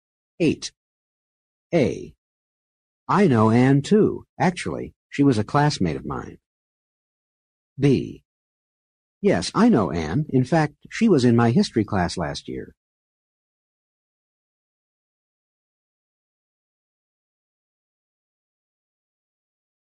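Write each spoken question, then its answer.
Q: A. I know Anne, too. Actually, she was a classmate of mine.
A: same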